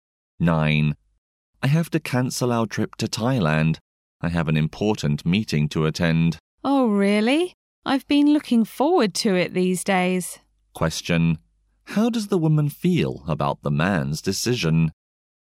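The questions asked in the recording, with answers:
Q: How does the woman feel about the man's decision?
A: Disappointed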